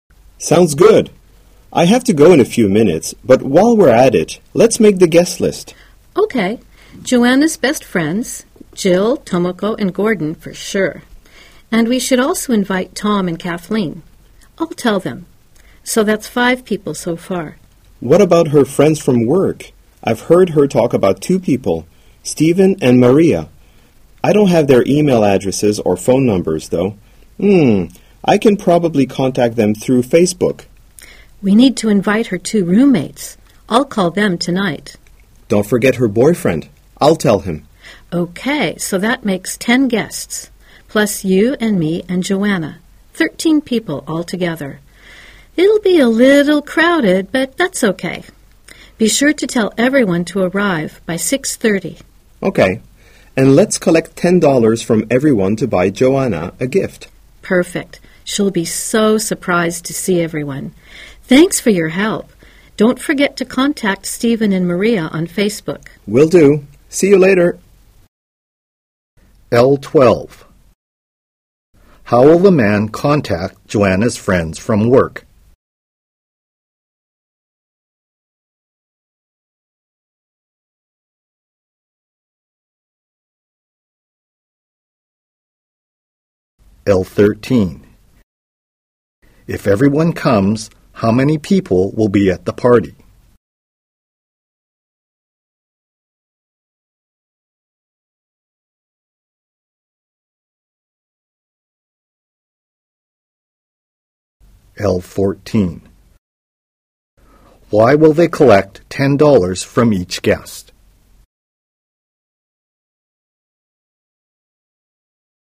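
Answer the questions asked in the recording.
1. Through Facebook
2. 13
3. To buy Joanna a birthday gift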